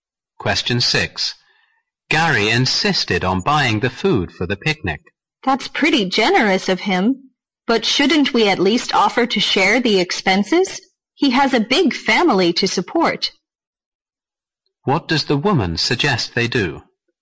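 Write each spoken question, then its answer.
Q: What does the woman suggest they do?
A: Offer to share the cost of the picnic food with Gary.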